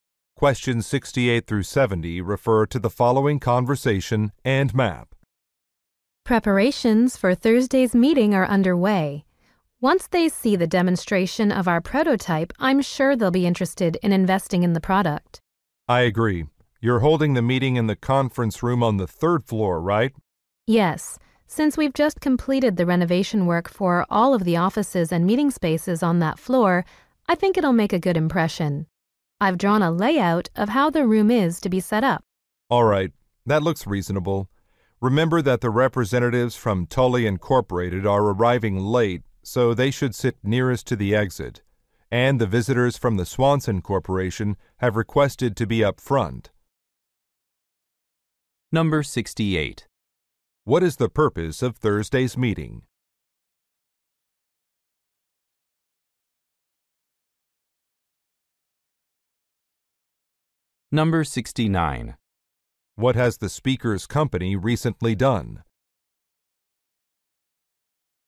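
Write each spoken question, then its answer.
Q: What is the purpose of Thursday's meeting?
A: To get investment by demonstrating a prototype

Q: What has the speaker's company recently done?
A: Renovated the third floor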